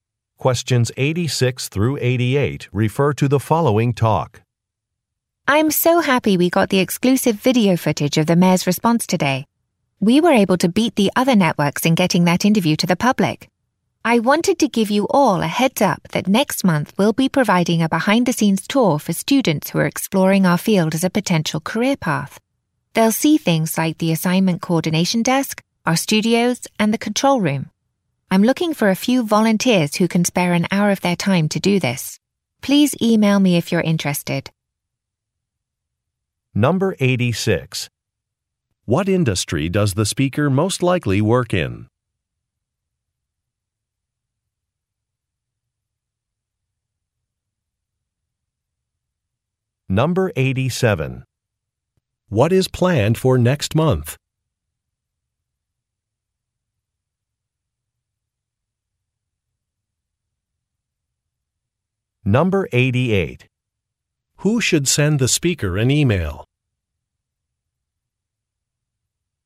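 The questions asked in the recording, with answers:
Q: What is planned for next month?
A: A behind-the-scenes tour for students

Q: Who should send the speaker an email?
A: People who want to volunteer to help with the tour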